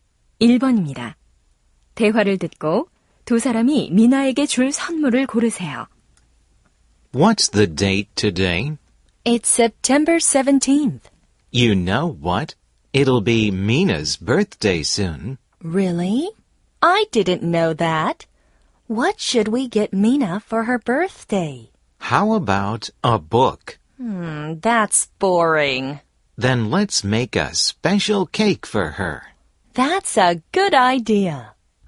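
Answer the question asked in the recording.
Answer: 특별한 케이크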